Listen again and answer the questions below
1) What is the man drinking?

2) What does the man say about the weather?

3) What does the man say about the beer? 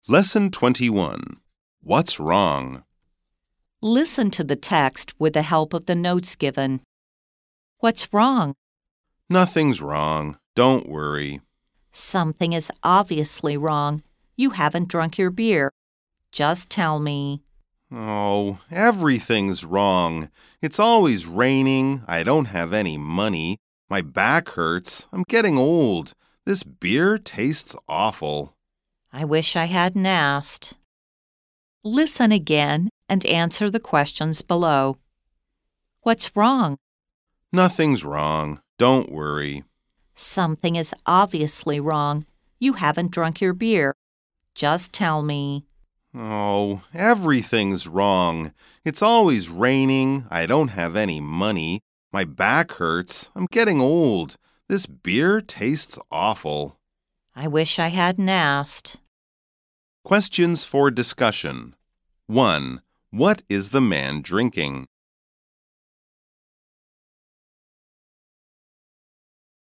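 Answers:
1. Beer.
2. It's always raining.
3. It tastes awful.

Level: 中階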